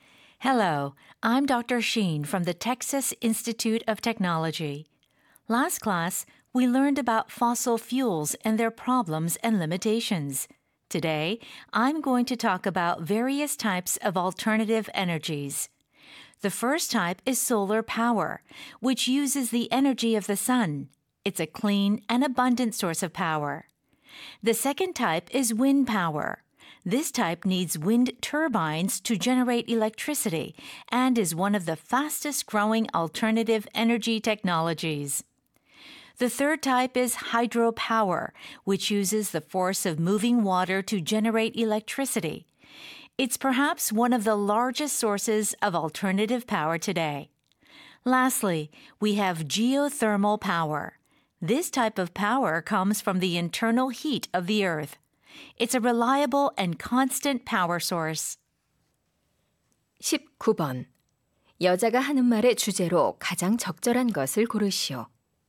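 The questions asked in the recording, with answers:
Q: 19번. 여자가 하는 말의 주제로 가장 적절한 것을 고르시오.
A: 여러 종류의 대체 에너지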